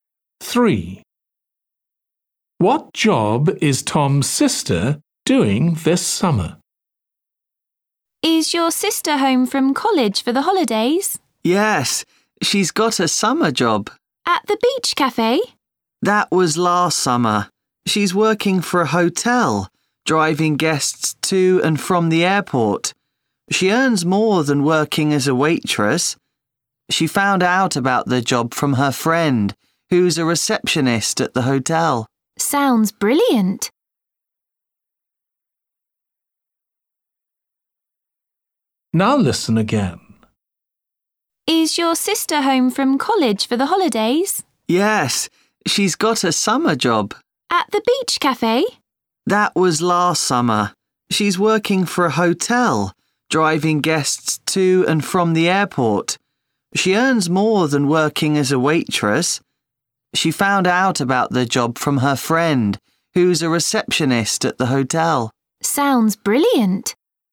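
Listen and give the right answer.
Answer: driving hotel guests to and from the airport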